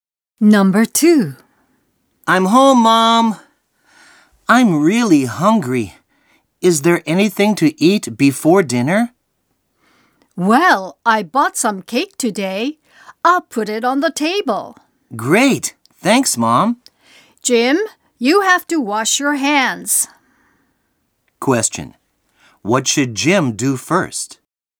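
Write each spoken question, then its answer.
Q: What should Jim do first?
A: Wash his hands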